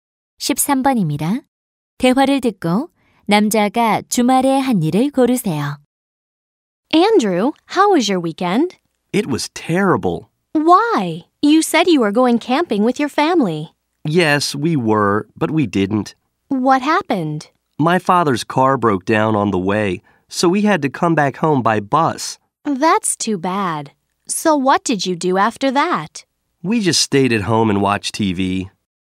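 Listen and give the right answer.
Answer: 집에서 TV 보기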